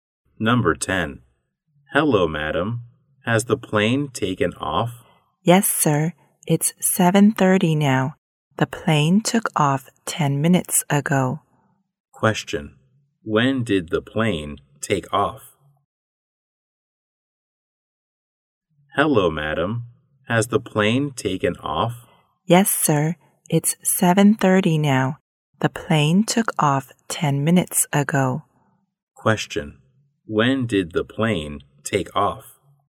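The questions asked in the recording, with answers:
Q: When did the plane take off?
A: At 7:20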